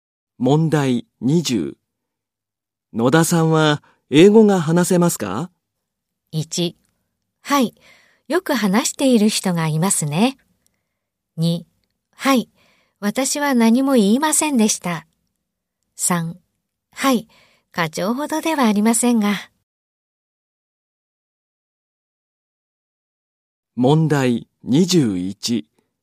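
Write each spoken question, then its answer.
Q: 野田さんは英語が話せますか?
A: 3: はい、課長ほどではありませんが。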